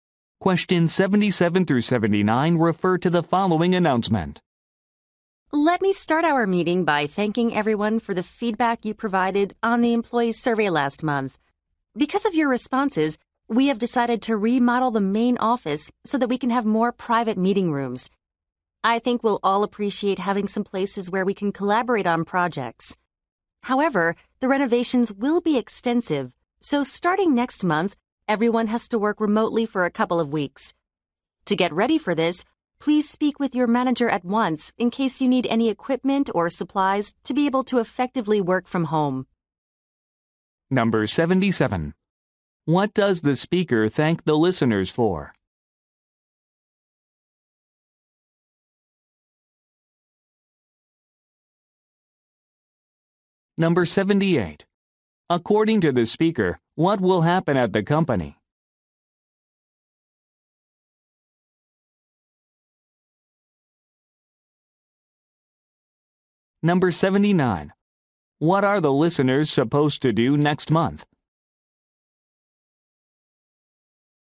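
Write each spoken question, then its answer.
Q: What does the speaker thank the listeners for?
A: Their feedback on the employee survey

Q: According to the speaker, what will happen at the company?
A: The main office will be remodeled to add private meeting rooms

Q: What are the listeners supposed to do next month?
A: Work remotely for a couple of weeks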